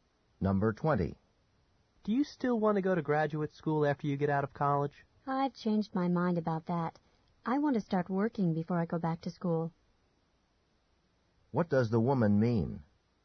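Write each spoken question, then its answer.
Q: What does the woman mean?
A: She will work before going to graduate school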